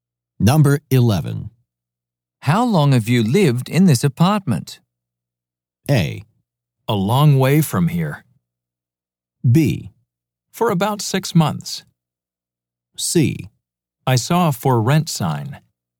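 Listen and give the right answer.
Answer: B: For about 6 months.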